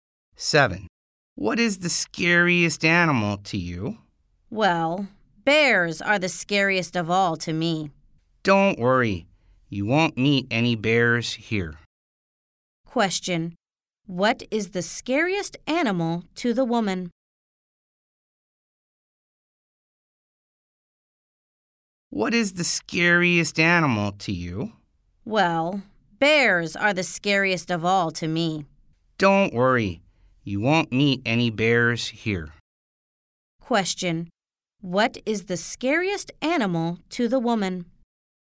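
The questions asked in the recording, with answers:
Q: What is the scariest animal to the woman?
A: Bears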